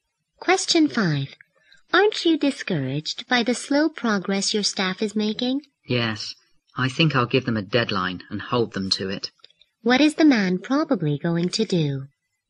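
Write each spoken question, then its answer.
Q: What is the man probably going to do?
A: Give his staff a deadline and hold them to it.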